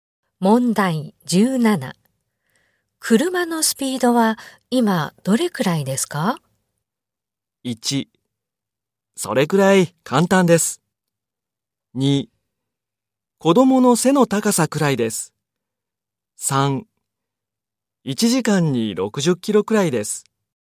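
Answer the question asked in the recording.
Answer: 3: 1時間に60キロくらいです。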